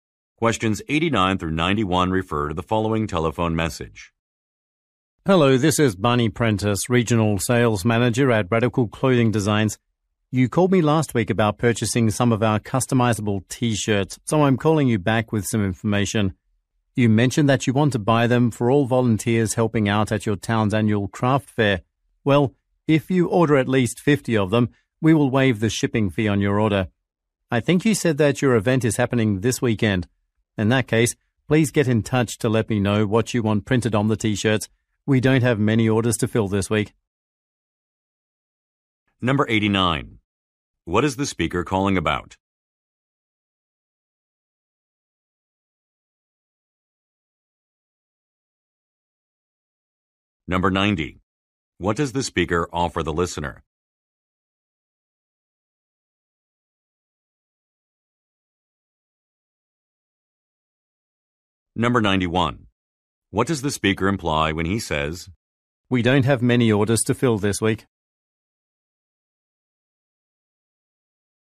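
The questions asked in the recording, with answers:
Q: What is the speaker calling about?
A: An order of customizable T-shirts

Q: What does the speaker offer the listener?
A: Free shipping for 50 or more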